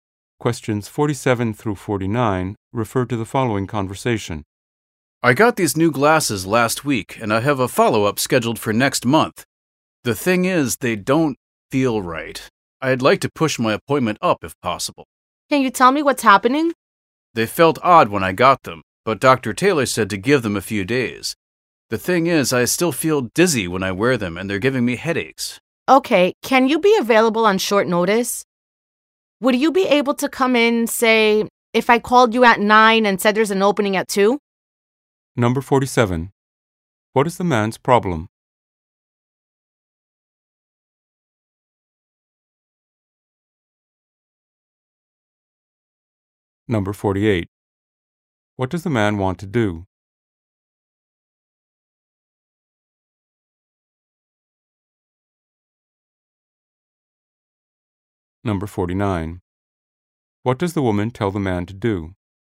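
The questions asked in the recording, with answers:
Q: What is the man's problem?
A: His new glasses make him dizzy and give him headaches

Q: What does the man want to do?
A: Move his appointment earlier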